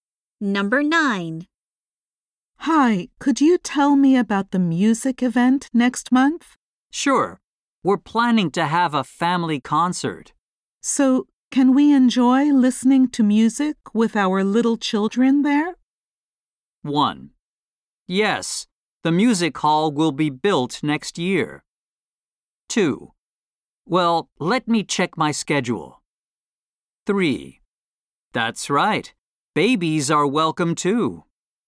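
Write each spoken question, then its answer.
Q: So, can we enjoy listening to music with our little children there?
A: 3: That's right. Babies are welcome too.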